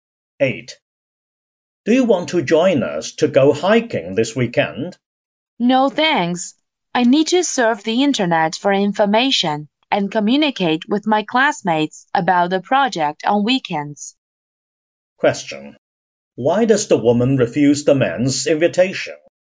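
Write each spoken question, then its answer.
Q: Why does the woman refuse the man's invitation?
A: She has to work on a project with her classmates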